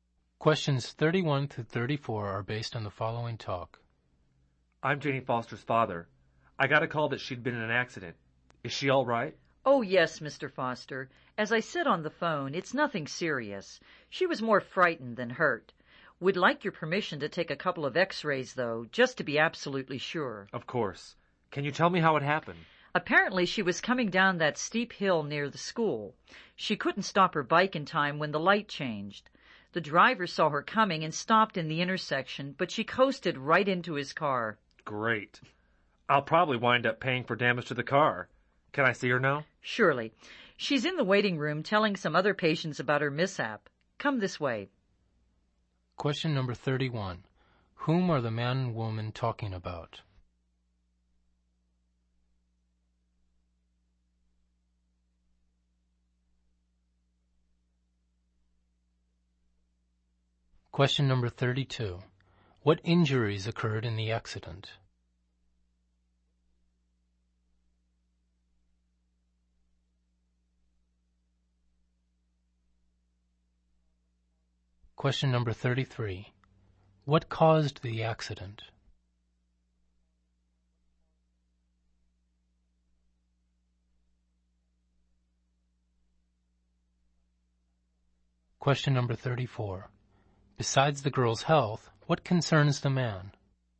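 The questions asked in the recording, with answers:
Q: Whom are the man and woman talking about?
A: The man's daughter, Janie

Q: What injuries occurred in the accident?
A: Nothing serious; she was more frightened than hurt

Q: What caused the accident?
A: She couldn't stop her bike on a steep hill and rode into a car

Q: Besides the girl's health, what concerns the man?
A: Paying for the damage to the car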